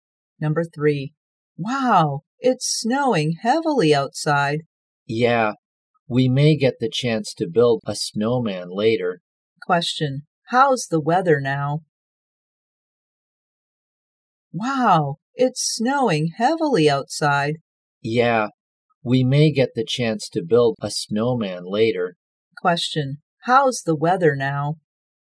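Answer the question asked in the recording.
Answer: Snowing heavily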